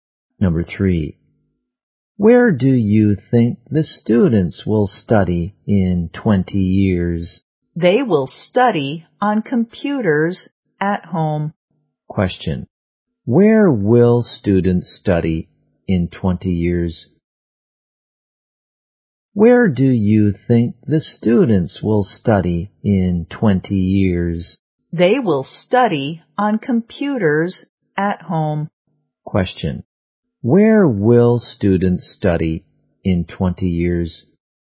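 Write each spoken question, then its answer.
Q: Where will students study in 20 years?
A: At home on computers.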